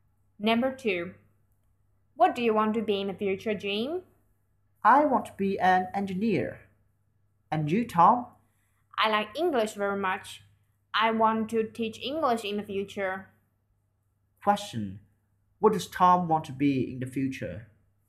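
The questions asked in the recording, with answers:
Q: What does Tom want to be in the future?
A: An English teacher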